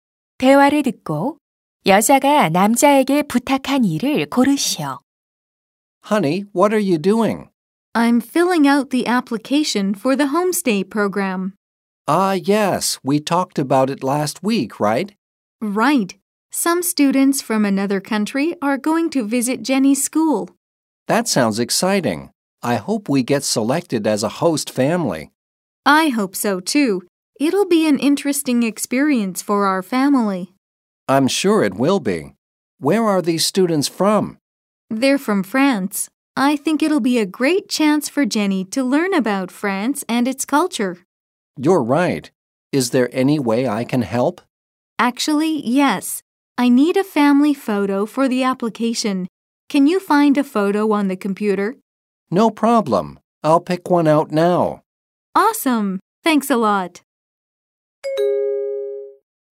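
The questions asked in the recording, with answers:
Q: 8번 대화를 듣고 여자가 남자에게 부탁한 일을 고르시오.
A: 컴퓨터에서 가족사진 찾아 주기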